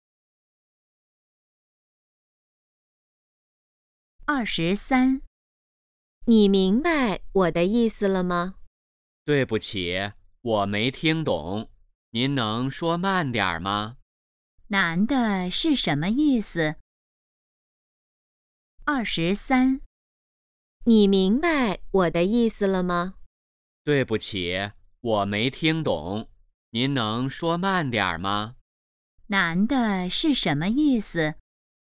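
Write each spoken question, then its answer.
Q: 男的是什么意思?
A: 没听懂,请说慢点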